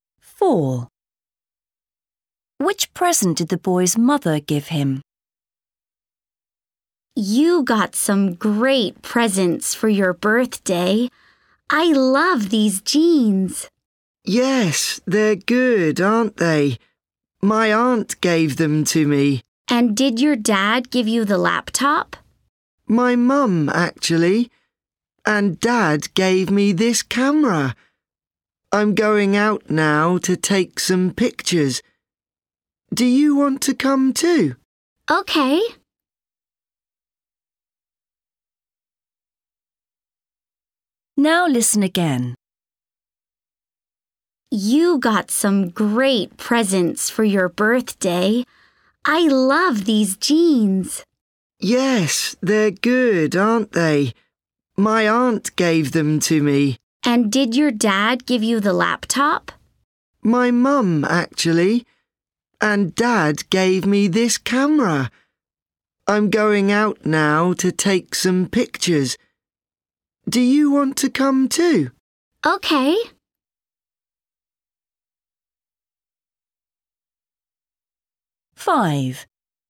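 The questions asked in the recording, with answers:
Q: Which present did the boy's mother give him?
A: a laptop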